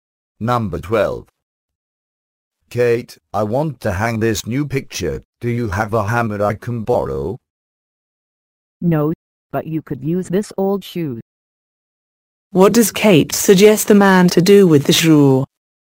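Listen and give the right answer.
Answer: Use it as a hammer to hang the picture.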